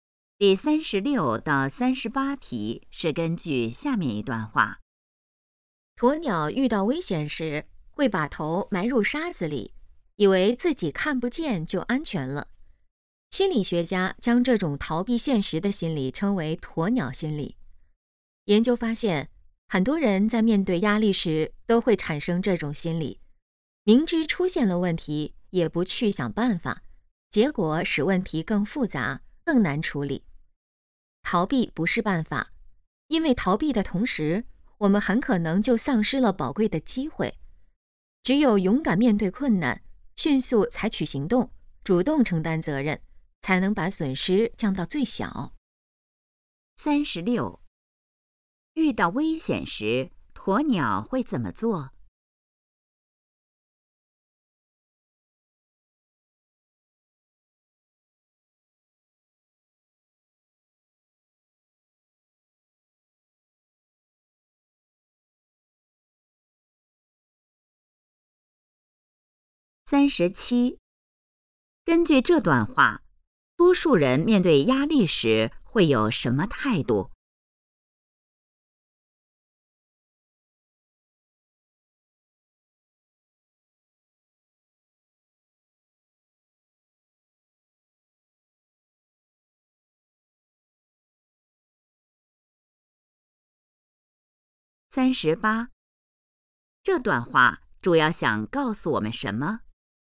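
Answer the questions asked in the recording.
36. 把头埋入沙子里
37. 逃避
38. 要勇敢面对困难,不要逃避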